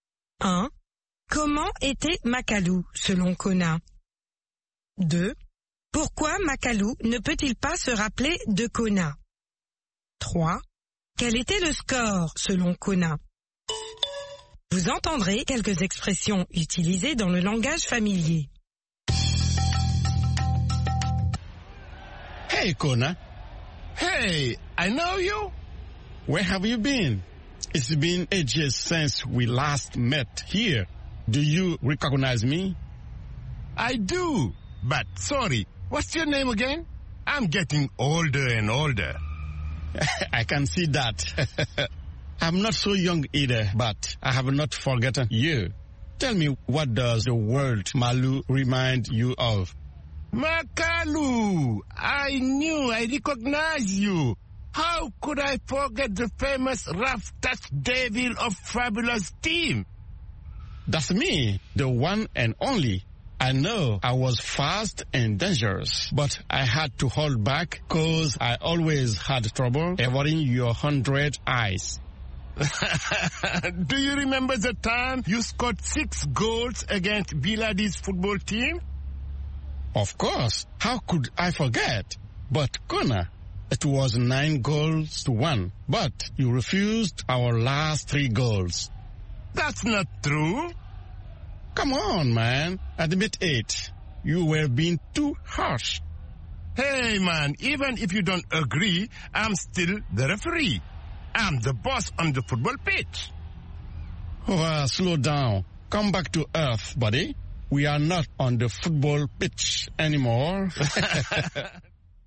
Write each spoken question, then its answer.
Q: Pourquoi Makalu ne peut-il pas se rappeler de Kona?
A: Parce qu'il devient de plus en plus vieux.